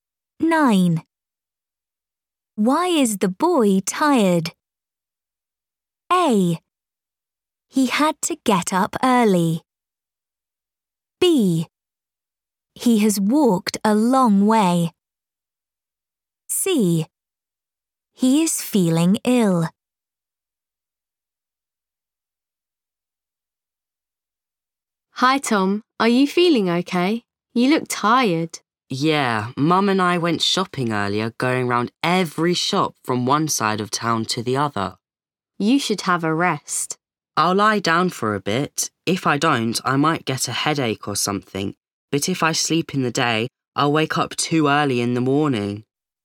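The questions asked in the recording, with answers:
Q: Why is the boy tired?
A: B: He has walked a long way.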